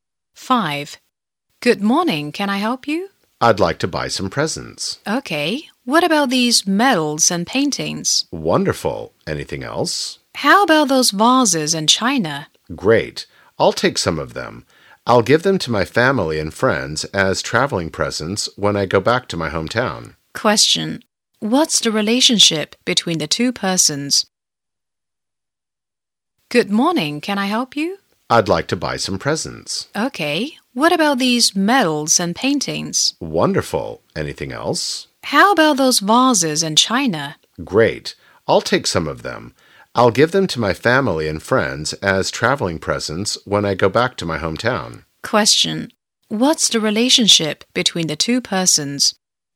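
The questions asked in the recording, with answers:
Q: Question. What's the relationship between the two persons?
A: Shop assistant and customer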